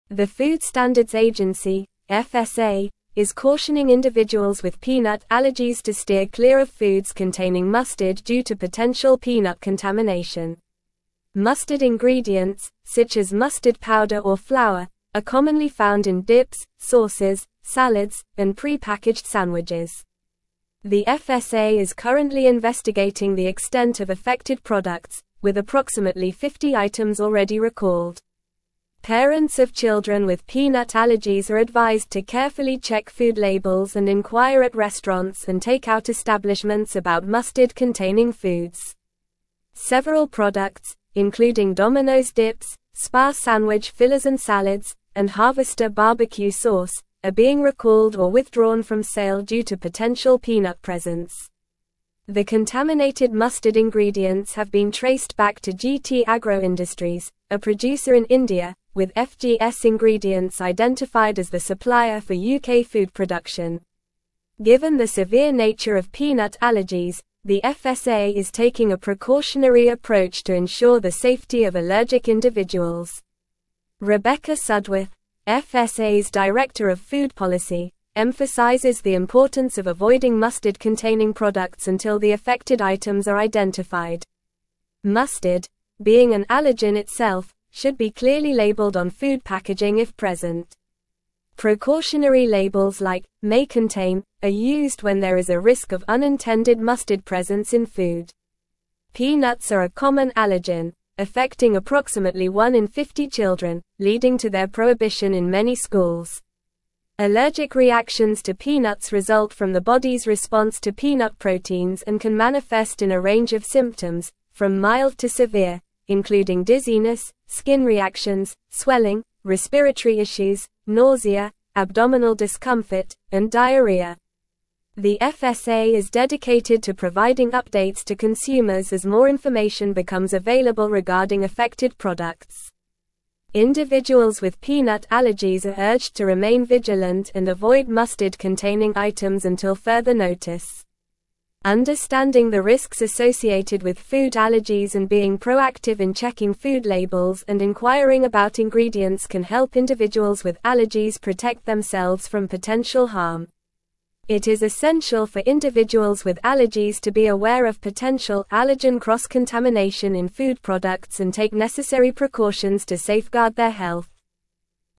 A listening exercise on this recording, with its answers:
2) The FSA is currently (2)______ the extent of affected products, with approximately 50 items already recalled.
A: investigating

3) Parents of (3)______ with peanut allergies are advised to carefully check food labels and inquire at (4)______ and take-out establishments about mustard-containing foods.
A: children

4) Parents of (3)______ with peanut allergies are advised to carefully check food labels and inquire at (4)______ and take-out establishments about mustard-containing foods.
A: restaurants

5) Several products, including Dominos dips, SPAR (5)______ fillers and salads, and Harvester BBQ sauce, are being recalled or withdrawn from sale due to potential peanut presence.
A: sandwich

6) Given the severe (6)______ of peanut allergies, the FSA is (7)______ a precautionary approach to ensure the safety of allergic individuals.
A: nature

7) Given the severe (6)______ of peanut allergies, the FSA is (7)______ a precautionary approach to ensure the safety of allergic individuals.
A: taking

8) Rebecca Sudworth, FSA's director of food policy, emphasizes the importance of avoiding mustard-containing (8)______ until the affected items are identified.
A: products

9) Precautionary labels like "may contain" are used when there is a risk of unintended (9)______ presence in food.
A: mustard

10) Allergic reactions to peanuts result from the body's response to peanut proteins and can manifest in a range of (10)______, from mild to severe, including dizziness, skin reactions, swelling, respiratory (11)______, nausea, (12)______ discomfort, and diarrhea.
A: symptoms

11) Allergic reactions to peanuts result from the body's response to peanut proteins and can manifest in a range of (10)______, from mild to severe, including dizziness, skin reactions, swelling, respiratory (11)______, nausea, (12)______ discomfort, and diarrhea.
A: issues

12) Allergic reactions to peanuts result from the body's response to peanut proteins and can manifest in a range of (10)______, from mild to severe, including dizziness, skin reactions, swelling, respiratory (11)______, nausea, (12)______ discomfort, and diarrhea.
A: abdominal

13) Individuals with peanut (13)______ are urged to remain vigilant and avoid mustard-containing items until further notice.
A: allergies

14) Understanding the (14)______ associated with food allergies and being proactive in checking food labels and inquiring about ingredients can help (15)______ with allergies protect themselves from potential harm.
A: risks

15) Understanding the (14)______ associated with food allergies and being proactive in checking food labels and inquiring about ingredients can help (15)______ with allergies protect themselves from potential harm.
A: individuals

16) It is essential for individuals with allergies to be aware of potential allergen cross-contamination in food products and take (16)______ precautions to safeguard their health.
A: necessary

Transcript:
The Food Standards Agency (FSA) is cautioning individuals with peanut allergies to steer clear of foods containing mustard due to potential peanut contamination. Mustard ingredients, such as mustard powder or flour, are commonly found in dips, sauces, salads, and pre-packaged sandwiches. The FSA is currently investigating the extent of affected products, with approximately 50 items already recalled. Parents of children with peanut allergies are advised to carefully check food labels and inquire at restaurants and take-out establishments about mustard-containing foods.
Several products, including Dominos dips, SPAR sandwich fillers and salads, and Harvester BBQ sauce, are being recalled or withdrawn from sale due to potential peanut presence. The contaminated mustard ingredients have been traced back to GT Agro Industries, a producer in India, with FGS Ingredients identified as the supplier for UK food production. Given the severe nature of peanut allergies, the FSA is taking a precautionary approach to ensure the safety of allergic individuals. Rebecca Sudworth, FSA's director of food policy, emphasizes the importance of avoiding mustard-containing products until the affected items are identified.
Mustard, being an allergen itself, should be clearly labeled on food packaging if present. Precautionary labels like "may contain" are used when there is a risk of unintended mustard presence in food. Peanuts are a common allergen, affecting approximately one in 50 children, leading to their prohibition in many schools. Allergic reactions to peanuts result from the body's response to peanut proteins and can manifest in a range of symptoms, from mild to severe, including dizziness, skin reactions, swelling, respiratory issues, nausea, abdominal discomfort, and diarrhea.
The FSA is dedicated to providing updates to consumers as more information becomes available regarding affected products. Individuals with peanut allergies are urged to remain vigilant and avoid mustard-containing items until further notice. Understanding the risks associated with food allergies and being proactive in checking food labels and inquiring about ingredients can help individuals with allergies protect themselves from potential harm. It is essential for individuals with allergies to be aware of potential allergen cross-contamination in food products and take necessary precautions to safeguard their health.

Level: Level 4